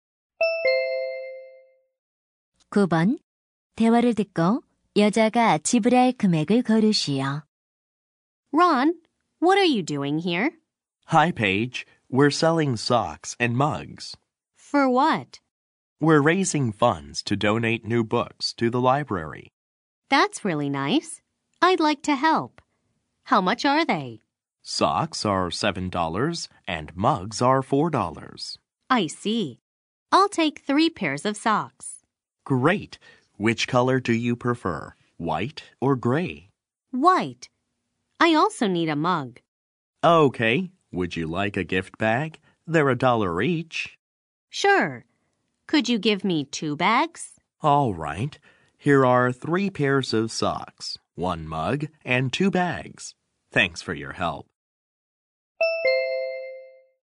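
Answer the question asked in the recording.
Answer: 27달러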